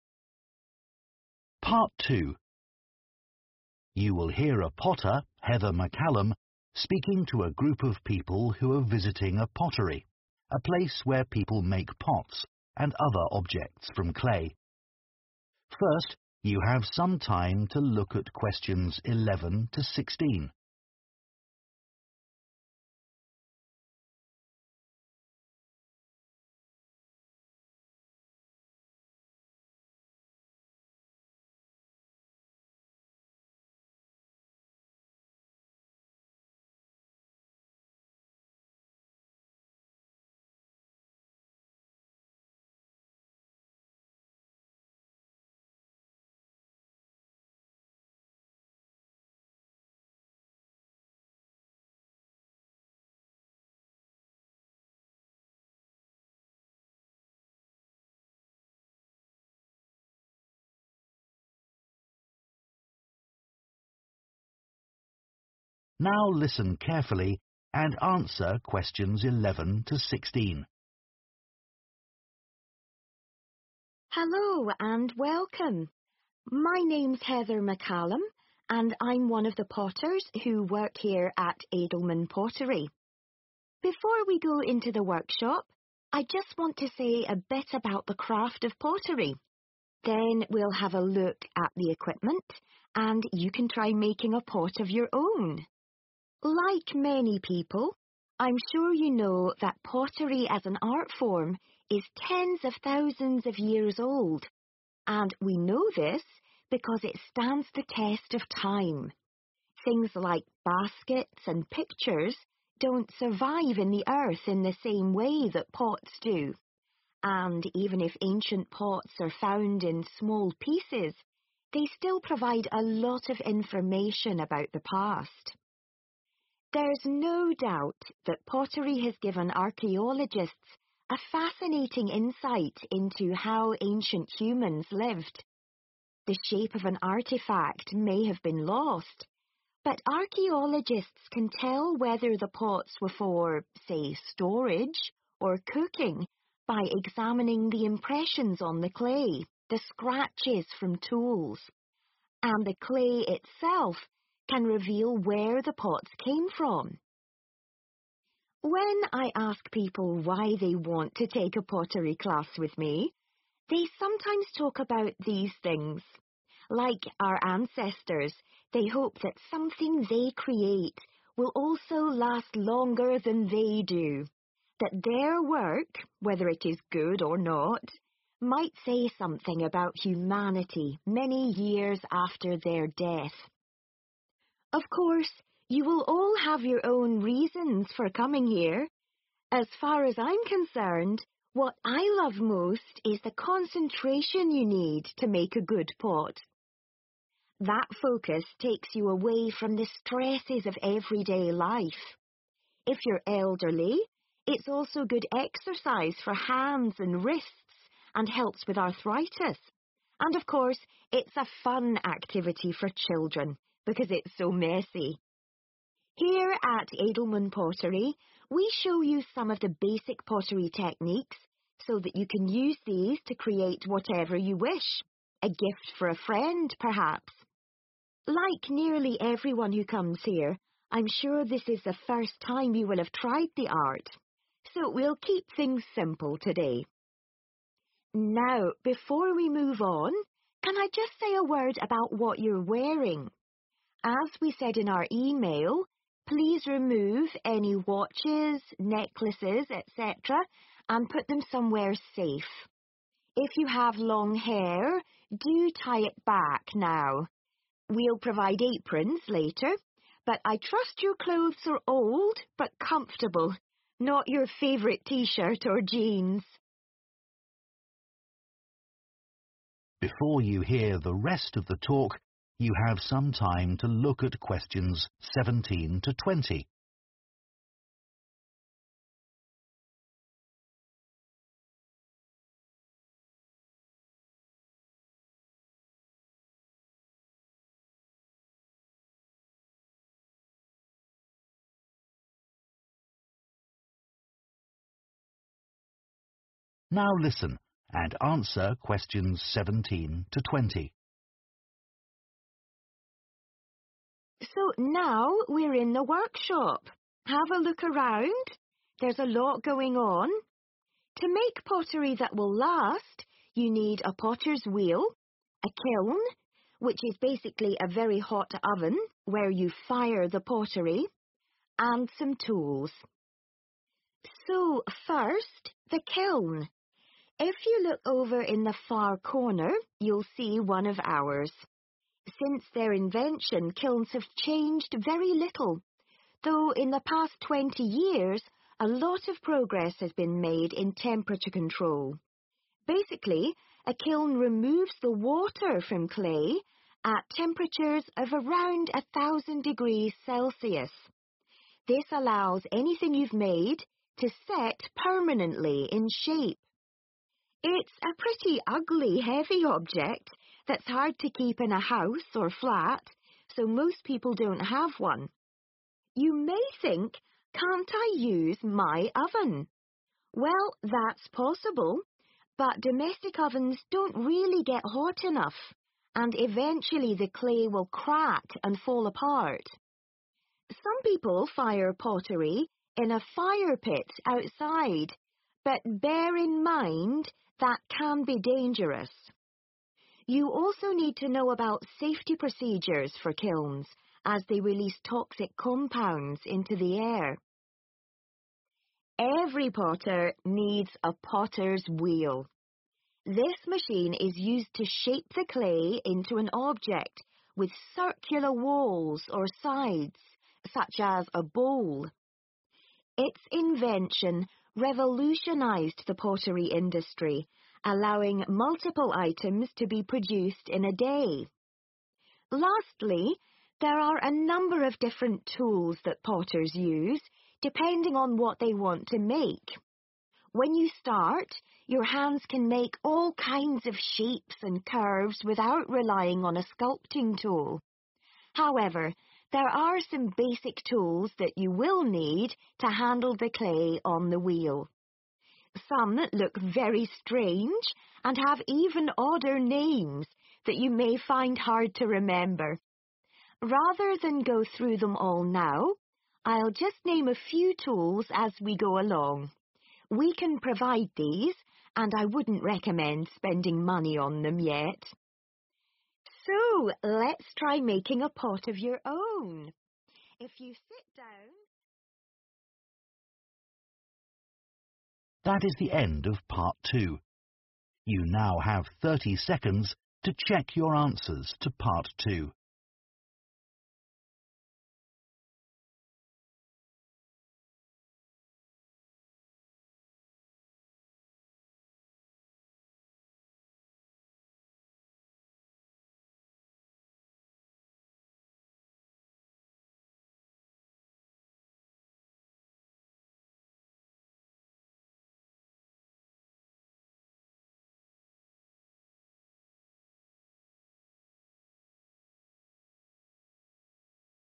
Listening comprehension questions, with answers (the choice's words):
Choose the correct letter, A, B, or C.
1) Heather says pottery differs from other art forms because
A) It lasts longer in the ground.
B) It is practised by more people.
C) It can be repaired more easily.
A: It lasts longer in the ground.

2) Archaeologists sometimes identify the use of ancient pottery from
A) The clay it was made with.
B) The marks that are on it.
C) The basic shape of it.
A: The marks that are on it.

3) Some people join Heather's pottery class because they want to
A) Create an item that looks very old.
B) Find something that they are good at.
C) Make something that will outlive them.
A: Make something that will outlive them.

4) What does Heather value most about being a potter?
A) Its calming effect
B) Its messy nature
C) Its physical benefits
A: Its calming effect

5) Most of the visitors to Edelman Pottery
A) Bring friends to join courses.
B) Have never made a pot before.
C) Try to learn techniques too quickly.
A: Have never made a pot before.

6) Heather reminds her visitors that they should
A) Put on their aprons.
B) Change their clothes.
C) Take off their jewellery.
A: Take off their jewellery.

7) Which TWO things does Heather explain about kilns?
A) What their function is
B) When they were invented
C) Ways of keeping them safe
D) Where to put one in your home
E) What some people use instead of one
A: What their function is

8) Which points does Heather make about a potter's tools?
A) Some are hard to hold.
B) Some are worth buying.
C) Some are essential items.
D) Some have memorable names.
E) Some are available for use by participants.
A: Some are essential items.

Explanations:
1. The correct answer is A because Heather explains that pottery, unlike things like baskets and pictures, can survive for thousands of years in the earth. She says ancient pots give important information about the past, which shows they last longer.
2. The correct answer is B because the speaker talks about how archaeologists can tell whether pots were for cooking or storage by examining the impressions on the clay and scratches from tools. This means that the marks on the pottery give important information about its use.
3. The correct answer is C because Heather explains that many people hope their pottery will last beyond their life and express something about humanity. This shows that they are interested in making something that will remember them and remain for a long time.
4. The correct answer is 'A' because Heather says that making a good pot requires a lot of focus and concentration, which helps people forget their everyday worries. This shows that she values the calming effect of pottery.
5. The correct answer is B because the transcript mentions that nearly everyone who comes to Edelman Pottery is trying pottery for the first time. It also states that they are likely inexperienced, which supports that they have never made a pot before.
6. The correct answer is C, take off their jewellery, because Heather specifically says, 'please remove any watches, necklaces, etc.' She emphasizes that it is important for safety and to protect their clothes while working with clay.
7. The correct answer is A (What their function is) and E (What some people use instead of one) because Heather talks about how kilns are very hot ovens that fire the pottery, which is their function. She also mentions that some people use their own ovens or fire pits outside instead of kilns.
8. The correct answer is C and E because Heather explains that there are some basic tools potters need to create pottery and that they can provide these tools for the participants. This shows that some tools are essential and available for use.

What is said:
Hello and welcome. My name's Heather McCallum and I'm one of the potters who work here at Edelman Pottery. Before we go into the workshop, I just want to say a bit about the craft of pottery. Then we'll have a look at the equipment and you can try making a pot of your own. Like many people, I'm sure you know that pottery as an art form is tens of thousands of years old. And we know this because it stands the test of time. Things like baskets and pictures don't survive in the earth in the same way that pots do. and even if ancient pots are found in small pieces they still provide a lot of information about the past. There no doubt that pottery has given archaeologists a fascinating insight into how ancient hls lived The shape of an artefact may have been lost but archaeologists can tell whether the pots were for, say, storage or cooking by examining the impressions on the clay, the scratches from tools, and the clay itself can reveal where the pots came from. When I ask people why they want to take a pottery class with me, they sometimes talk about these things. Like our ancestors, they hope that something they create will also last longer than they do, that their work, whether it is good or not, might say something about humanity many years after their death. Of course, you will all have your own reasons for coming here. As far as I'm concerned, what I love most is the concentration you need to make a good pot. That focus takes you away from the stresses of everyday life. If you're elderly, it's also good exercise for hands and wrists and helps with arthritis. And of course, it's a fun activity for children because it's so messy. Here at Edelman Pottery, we show you some of the basic pottery techniques so that you can use these to create whatever you wish. A gift for a friend, perhaps. Like nearly everyone who comes here, I'm sure this is the first time you will have tried the art So we'll keep things simple today Now, before we move on, can I just say a word about what you're wearing? As we said in our email please remove any watches necklaces etc and put them somewhere safe If you have long hair do tie it back now We provide aprons later but I trust your clothes are old but comfortable not your favourite T-shirt or jeans.
So now we're in the workshop. There's a lot going on. To make pottery that will last, you need a potter's wheel, a kiln, which is basically a very hot oven where you fire the pottery, and some tools. So, first, the kiln. If you look over in the far corner, you'll see one of ours. Since their invention, kilns have changed very little, though in the past 20 years a lot of progress has been made in temperature control. Basically, a kiln removes the water from clay at temperatures of around 1000 degrees Celsius. This allows anything you've made to set permanently in shape. It's a pretty ugly heavy object that's hard to keep in a house or flat, so most people don't have one.
You may think, can't I use my oven? Well, that's possible, but domestic ovens don't really get hot enough and eventually the clay will crack and fall apart. Some people fire pottery in a fire pit outside but bear in mind... that can be dangerous You also need to know about safety procedures for kilns as they release toxic compounds into the air Every potter needs a potter's wheel. This machine is used to shape the clay into an object with circular walls or sides, such as a bowl. Its invention revolutionised the pottery industry, allowing multiple items to be produced in a day. Lastly, there are a number of different tools that potters use, depending on what they want to make. When you start, your hands can make all kinds of shapes and curves without relying on a sculpting tool. However, there are some basic tools that you will need to handle the clay on the wheel. Some look very strange and have even odder names that you may find hard to remember. Rather than go through them all now, I'll just name a few tools as we go along. We can provide these and I wouldn't recommend spending money on them yet. If you sit down...